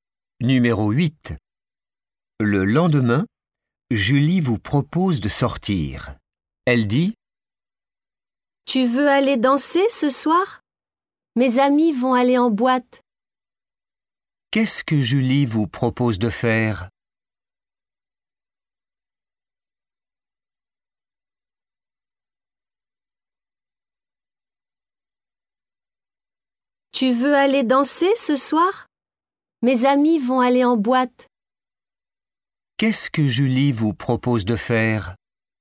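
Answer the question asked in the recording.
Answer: Aller danser (en boîte)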